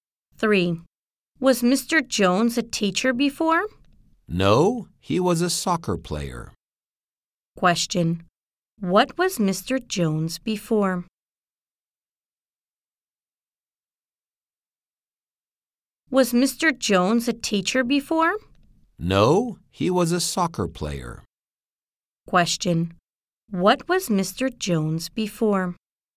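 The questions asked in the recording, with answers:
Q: Question, what was Mr. Jones before?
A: A soccer player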